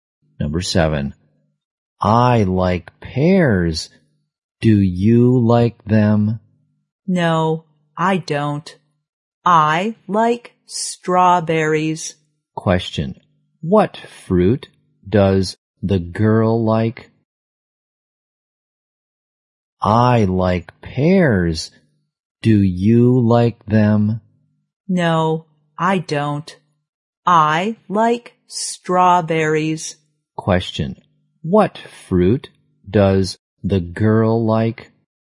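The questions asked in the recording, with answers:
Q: Question, what fruit does the girl like?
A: Strawberries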